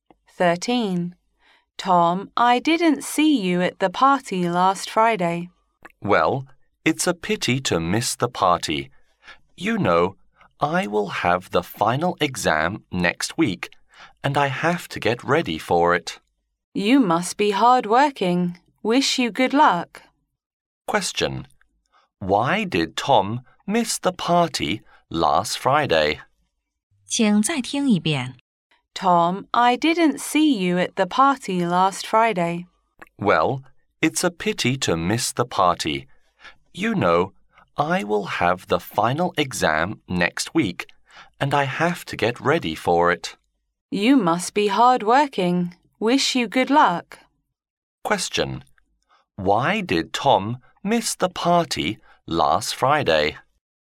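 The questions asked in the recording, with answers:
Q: Question.Why did Tom miss the party last Friday?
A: He had to prepare for the final exam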